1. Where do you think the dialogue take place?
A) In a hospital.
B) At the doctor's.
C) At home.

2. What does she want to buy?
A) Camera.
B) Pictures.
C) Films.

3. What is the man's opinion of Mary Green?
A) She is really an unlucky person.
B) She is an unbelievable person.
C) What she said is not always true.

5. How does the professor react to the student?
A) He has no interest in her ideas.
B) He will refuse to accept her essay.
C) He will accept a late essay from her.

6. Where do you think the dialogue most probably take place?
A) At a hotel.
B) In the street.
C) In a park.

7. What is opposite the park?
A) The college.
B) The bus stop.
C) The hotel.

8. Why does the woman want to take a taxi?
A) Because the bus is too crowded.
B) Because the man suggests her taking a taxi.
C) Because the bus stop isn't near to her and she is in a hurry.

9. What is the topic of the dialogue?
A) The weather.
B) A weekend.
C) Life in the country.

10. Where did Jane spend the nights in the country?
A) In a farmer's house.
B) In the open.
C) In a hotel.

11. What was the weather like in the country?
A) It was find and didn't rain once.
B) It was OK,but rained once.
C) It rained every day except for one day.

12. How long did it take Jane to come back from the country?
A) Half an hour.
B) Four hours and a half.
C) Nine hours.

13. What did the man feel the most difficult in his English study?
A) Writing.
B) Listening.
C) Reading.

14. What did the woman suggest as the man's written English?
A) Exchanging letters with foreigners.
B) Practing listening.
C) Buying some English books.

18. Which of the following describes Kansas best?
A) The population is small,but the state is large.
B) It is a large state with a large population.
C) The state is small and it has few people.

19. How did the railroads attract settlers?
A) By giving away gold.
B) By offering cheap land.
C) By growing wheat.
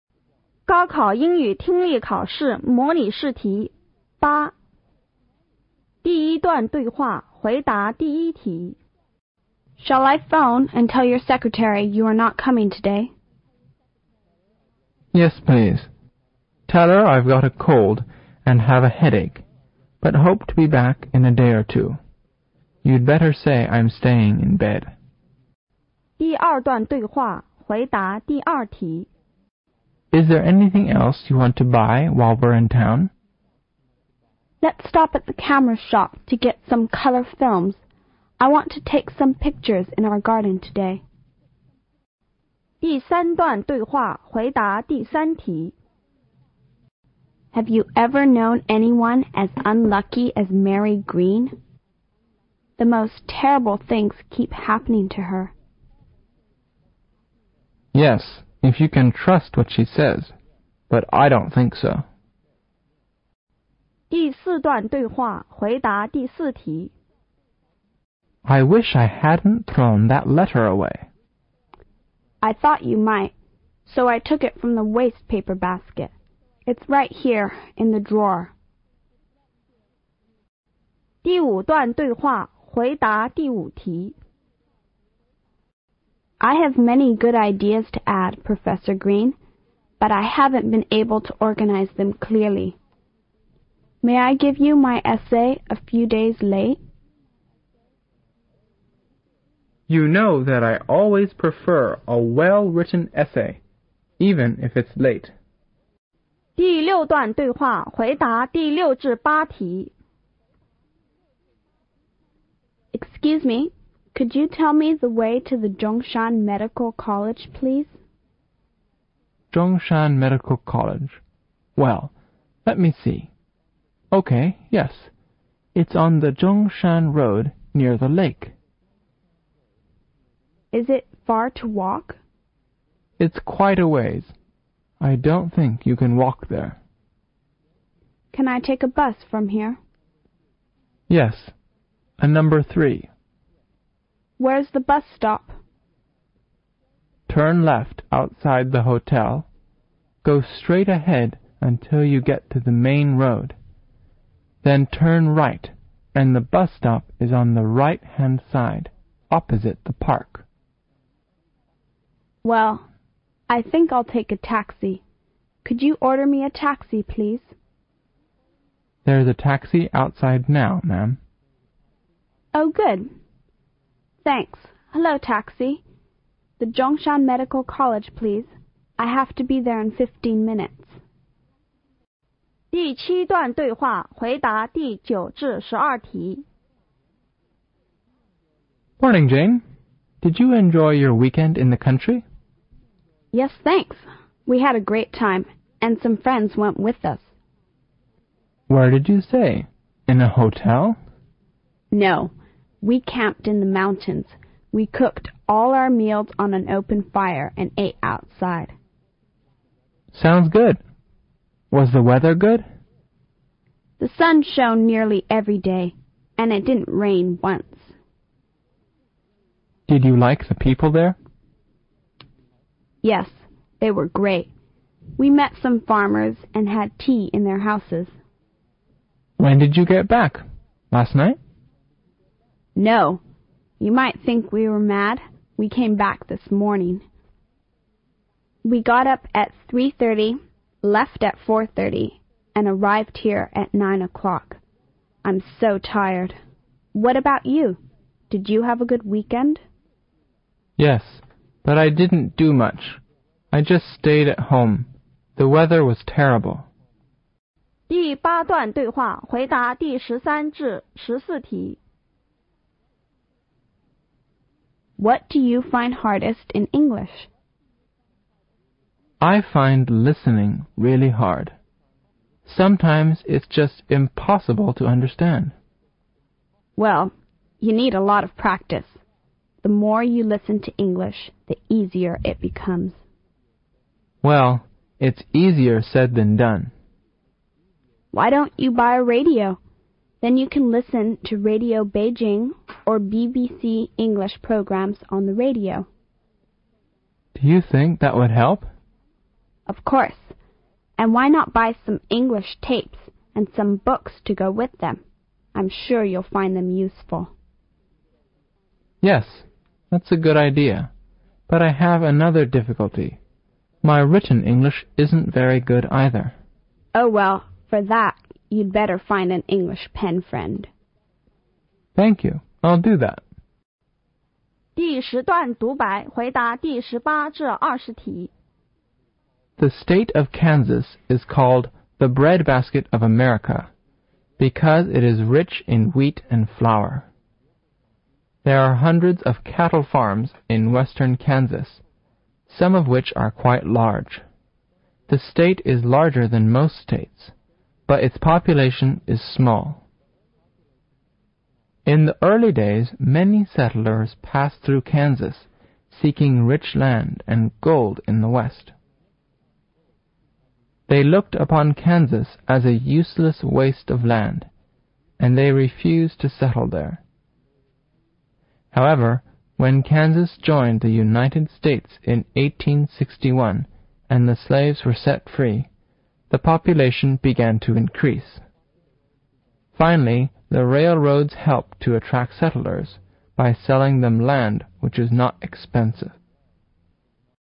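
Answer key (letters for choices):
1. C
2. C
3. C
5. C
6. A
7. B
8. C
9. B
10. B
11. A
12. B
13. B
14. A
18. A
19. B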